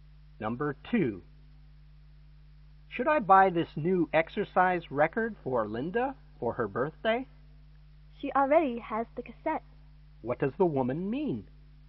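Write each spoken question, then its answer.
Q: What does the woman mean?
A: Linda already has it, so he shouldn't buy it.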